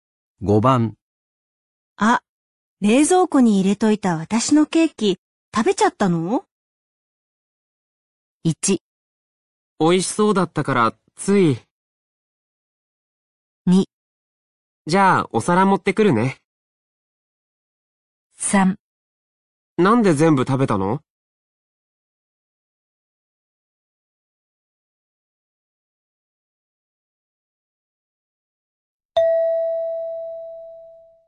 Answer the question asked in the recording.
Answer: 1

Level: N3 Listening · Test 12